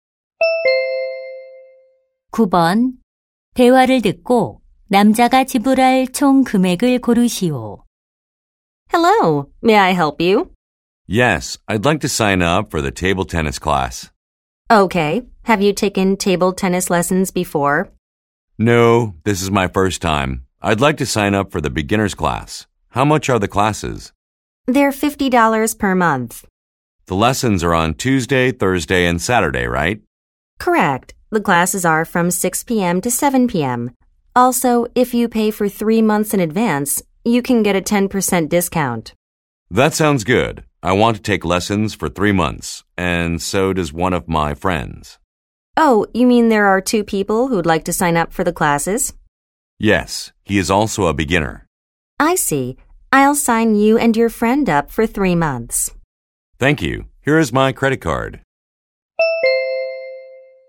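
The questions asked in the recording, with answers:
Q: 대화를 듣고 남자가 지불할 총 금액을 고르시오.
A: $270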